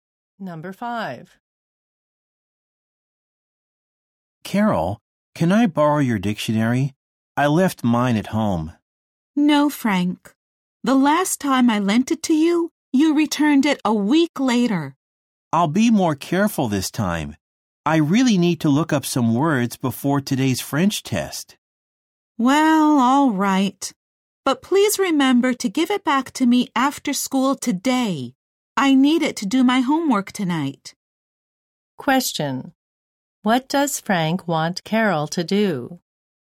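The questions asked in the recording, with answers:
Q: What does Frank want Carol to do?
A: Lend him her dictionary.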